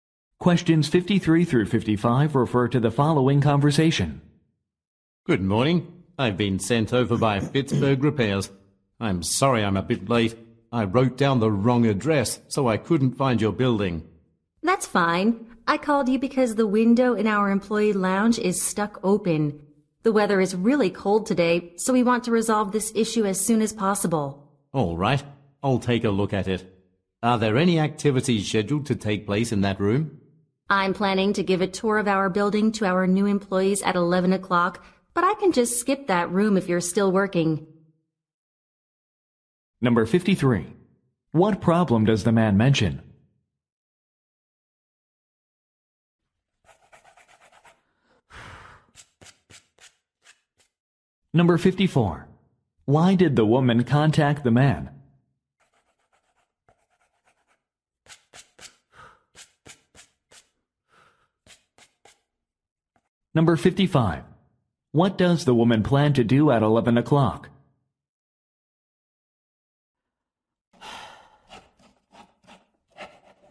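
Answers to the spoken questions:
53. He wrote down the wrong address
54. A window is stuck open
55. Give new employees a building tour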